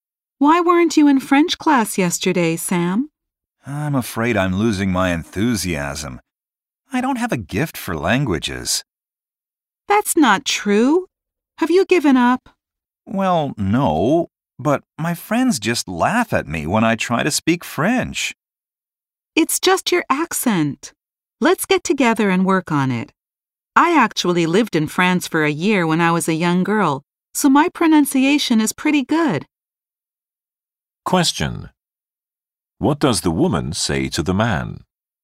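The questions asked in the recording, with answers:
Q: What does the woman say to the man?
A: She offers to help him work on his French accent.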